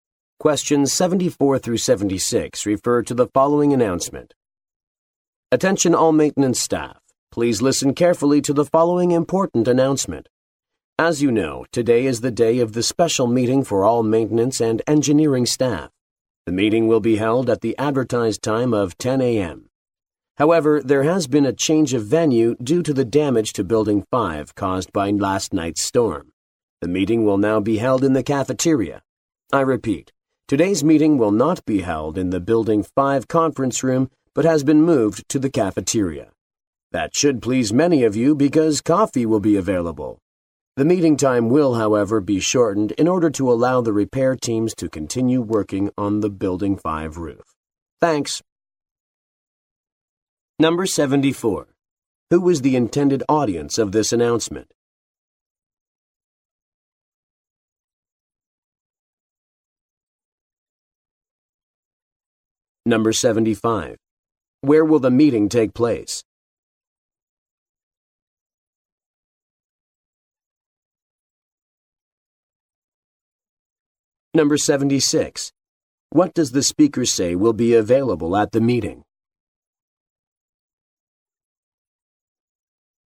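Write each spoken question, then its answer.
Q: Who was the intended audience of this announcement?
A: Maintenance staff

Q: Where will the meeting take place?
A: In the cafeteria

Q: What does the speaker say will be available at the meeting?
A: Coffee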